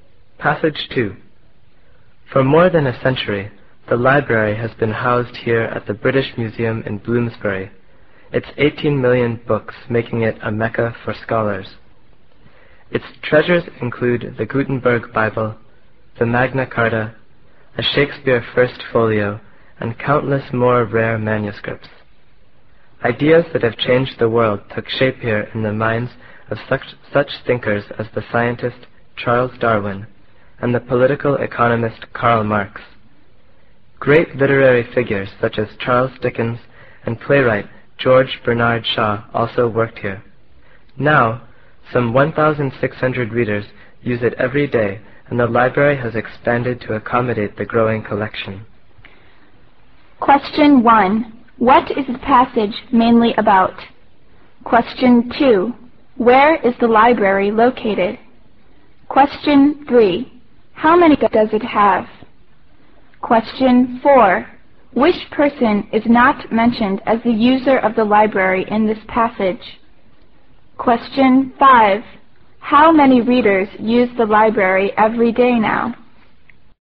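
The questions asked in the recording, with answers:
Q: What is the passage mainly about?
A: The library at the British Museum

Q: Where is the library located?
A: At the British Museum in Bloomsbury

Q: How many readers use the library every day now?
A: About 1,600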